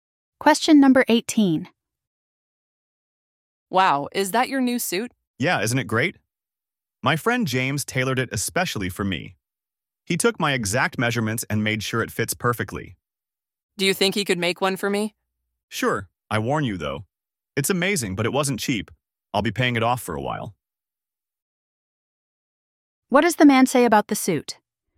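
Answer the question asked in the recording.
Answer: It was custom tailored but expensive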